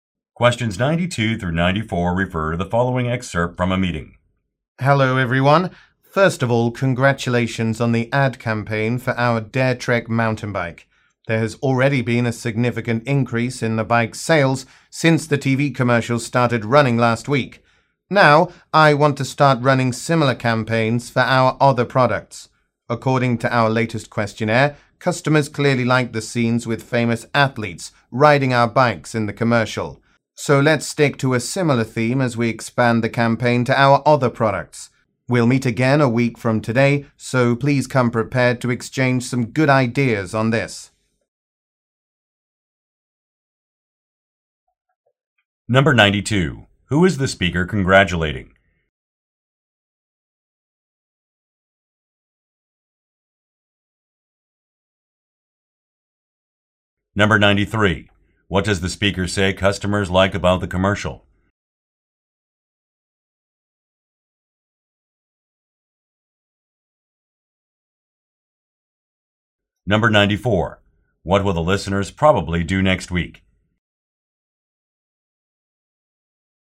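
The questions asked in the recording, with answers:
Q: Who is the speaker congratulating?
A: The team that worked on the ad campaign for the Dare Trek mountain bike

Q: What does the speaker say customers like about the commercial?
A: The scenes with famous athletes riding the bikes

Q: What will the listeners probably do next week?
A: Meet again and share ideas for the new campaigns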